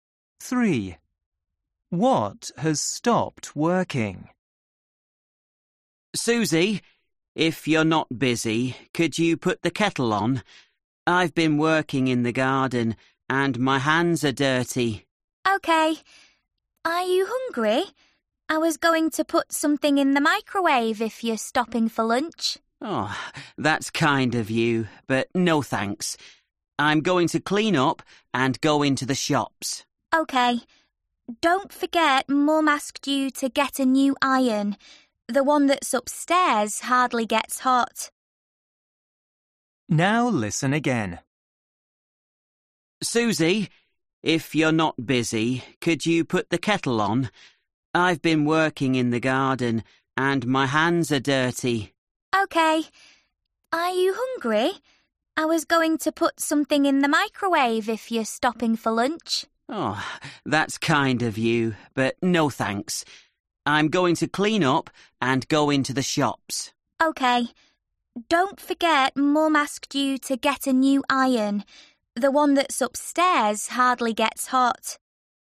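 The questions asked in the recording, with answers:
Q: What has stopped working?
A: the iron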